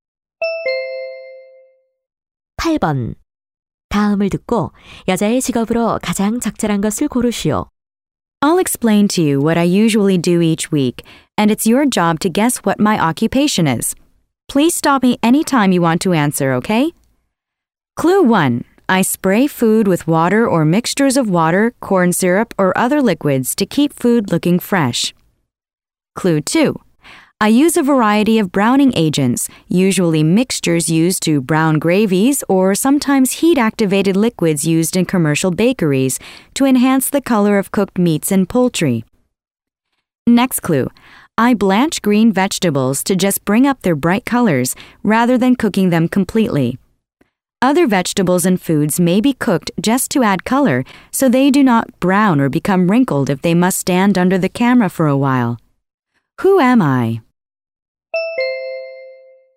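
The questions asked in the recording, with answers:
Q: 다음을 듣고 여자의 직업으로 가장 적절한 것을 고르시오.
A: 푸드 스타일리스트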